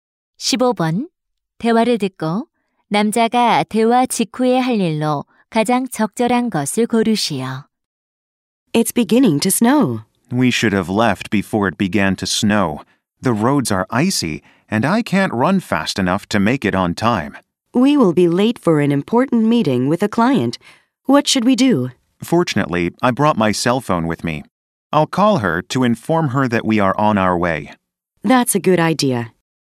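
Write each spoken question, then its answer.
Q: 대화를 듣고 남자가 대화 직후에 할 일로 가장 적절한 것을 고르시오.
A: 고객에게 전화하기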